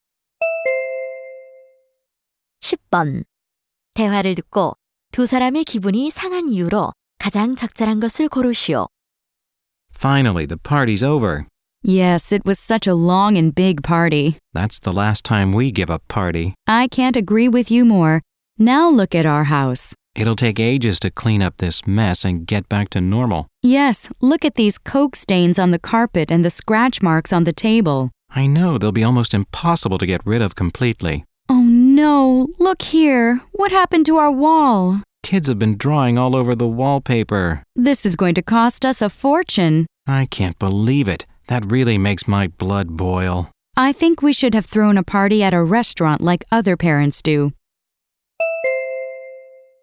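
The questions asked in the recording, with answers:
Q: 대화를 듣고 두 사람의 기분이 상한 이유로 가장 적절한 것을 고르시오.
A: 파티 후 집이 엉망이 되어서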